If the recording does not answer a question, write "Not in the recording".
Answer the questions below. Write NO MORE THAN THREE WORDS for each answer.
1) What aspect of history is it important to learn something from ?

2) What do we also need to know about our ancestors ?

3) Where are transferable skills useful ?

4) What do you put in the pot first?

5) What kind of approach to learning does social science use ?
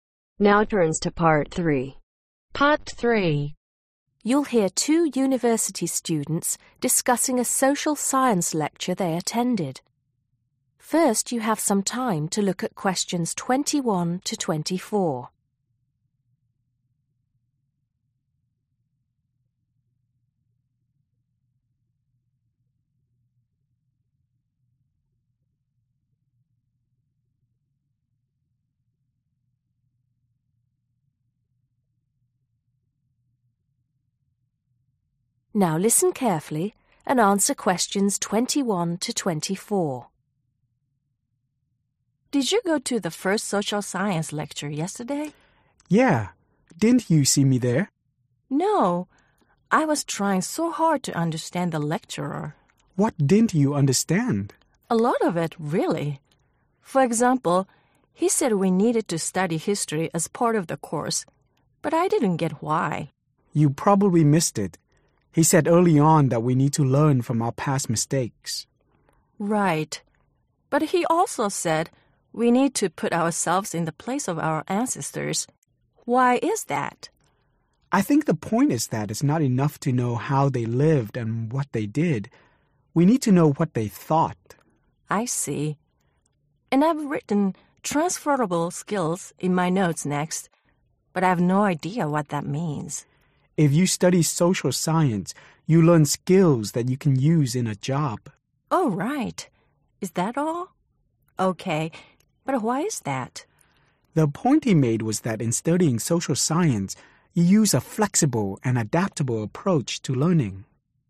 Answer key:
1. (Our) past mistakes
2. What they thought
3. In a job
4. Not in the recording
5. Flexible and adaptable